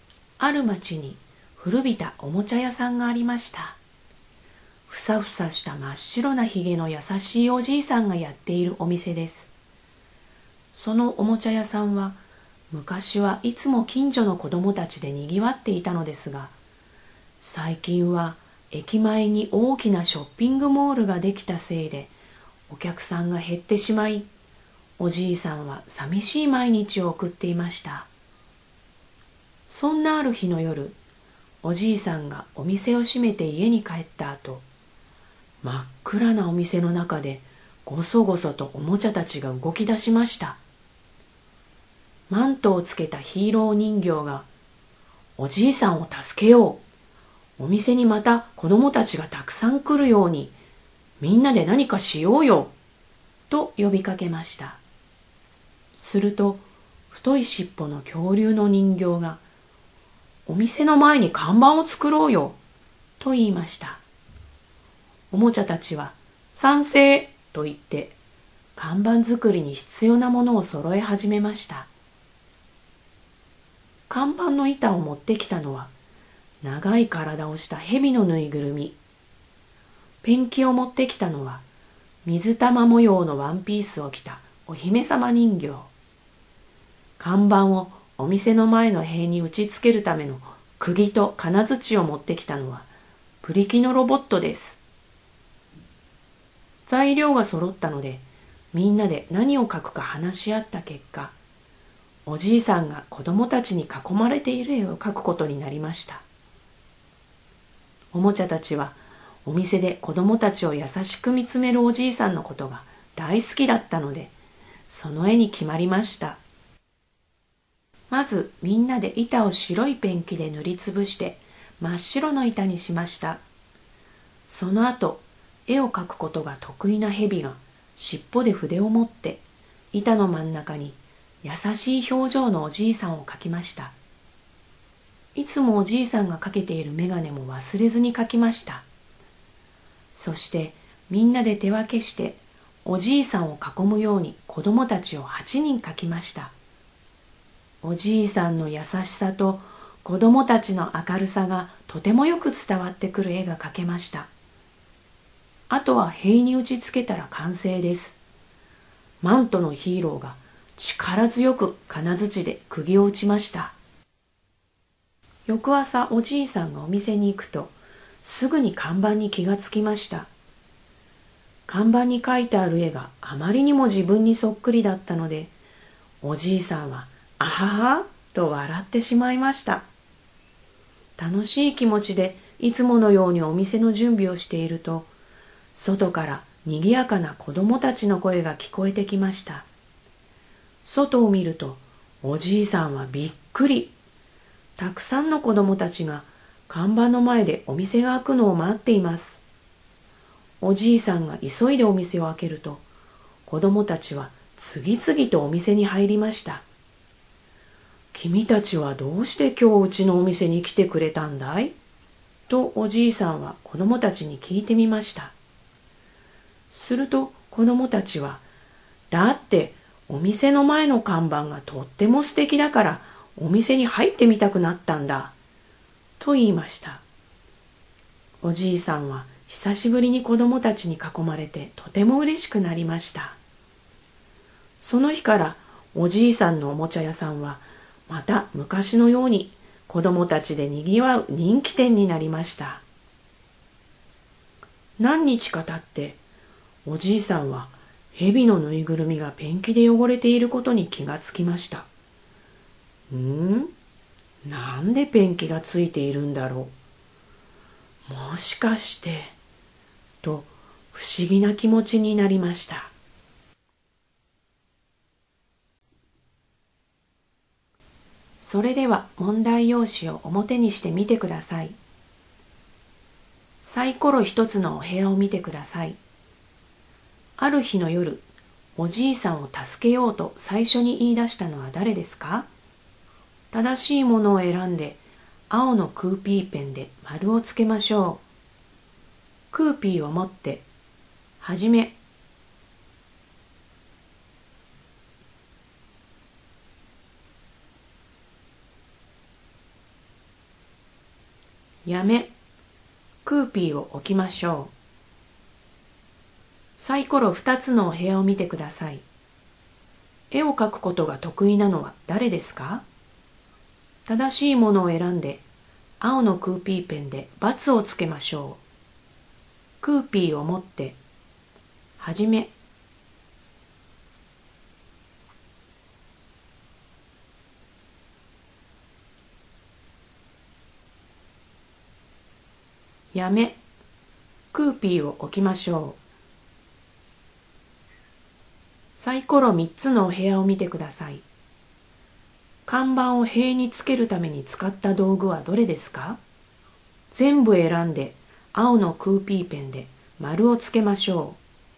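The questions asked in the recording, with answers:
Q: ある日の夜、おじいさんを助けようと最初に言い出したのは誰ですか?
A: マントをつけたヒーロー人形

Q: 絵を描くことが得意なのは誰ですか?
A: 蛇のぬいぐるみ

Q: 看板を塀につけるために使った道具はどれですか?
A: 釘と金槌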